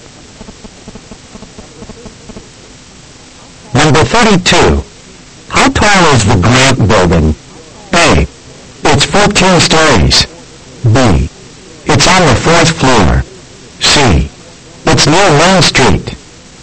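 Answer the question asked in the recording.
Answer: A: It's 14 stories.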